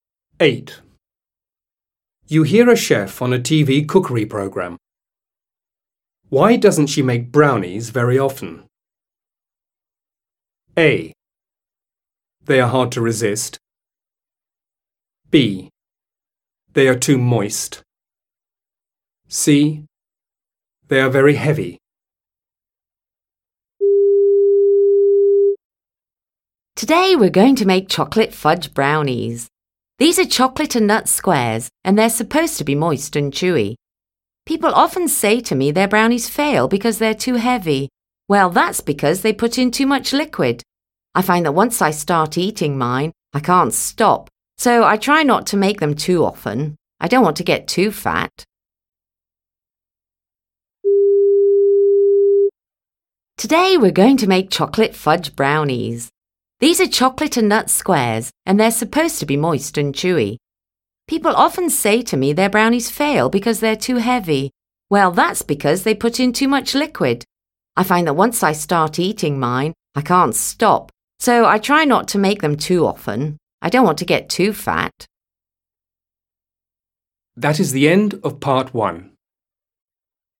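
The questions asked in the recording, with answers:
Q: Why doesn't she make brownies very often?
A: A: They are hard to resist.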